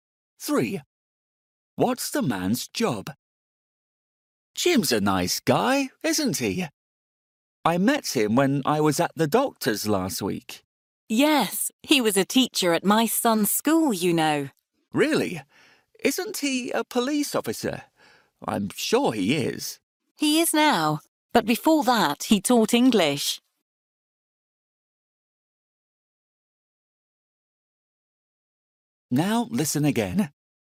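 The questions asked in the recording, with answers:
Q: What's the man's job?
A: Police officer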